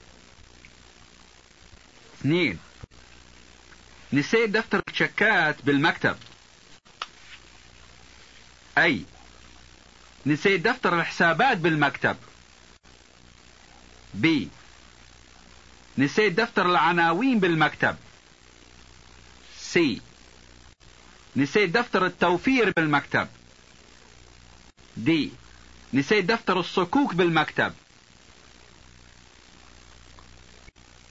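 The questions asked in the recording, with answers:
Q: نسيت دفتر الشكات بالمكتب.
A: D: نسيت دفتر الصكوك بالمكتب.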